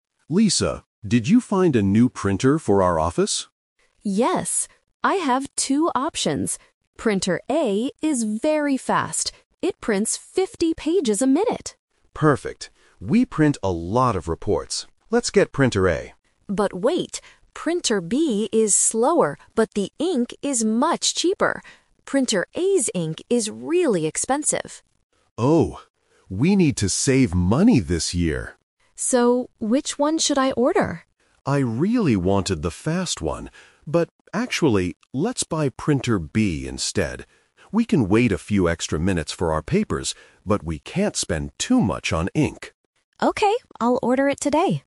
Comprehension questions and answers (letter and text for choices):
Listen to the conversation and choose the correct answer (A, B, or C).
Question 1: What is good about Printer A?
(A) It has cheap ink.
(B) It prints very fast.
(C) It is very quiet.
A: (B) It prints very fast.

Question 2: What is the problem with Printer A?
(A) The ink is too expensive.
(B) It is too slow.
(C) It is too big for the office.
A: (A) The ink is too expensive.

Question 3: Which printer does Mr. Davis decide to buy?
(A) Printer A, because it is fast.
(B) Printer B, because the ink is cheaper.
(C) He decides to fix the old printer.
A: (B) Printer B, because the ink is cheaper.

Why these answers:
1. Lisa says that Printer A is "very fast" and can print 50 pages a minute. Option A is a trap because cheap ink is a feature of Printer B. Option C is a plausible feature for a printer but is not mentioned in the audio.
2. Lisa warns Mr. Davis that "Printer A's ink is really expensive." Option B is a trap because being slow is the problem with Printer B, not Printer A. Option C is a plausible guess but is never mentioned.
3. This uses the "Twist" technique. Mr. Davis originally wants Printer A because they print a lot of reports, but he changes his mind to save money. He decides to buy Printer B because the ink is cheaper. Option A is the main trap (his original plan). Option C is incorrect.

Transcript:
Mr. Davis: Lisa, did you find a new printer for our office?
Lisa: Yes. I have two options. Printer A is very fast. It prints 50 pages a minute!
Mr. Davis: Perfect! We print a lot of reports. Let's get Printer A.
Lisa: But wait. Printer B is slower, but the ink is much cheaper. Printer A's ink is really expensive.
Mr. Davis: Oh. We need to save money this year.
Lisa: So, which one should I order?
Davis: I really wanted the fast one, but actually, let's buy Printer B instead. We can wait a few extra minutes for our papers, but we can't spend too much on ink.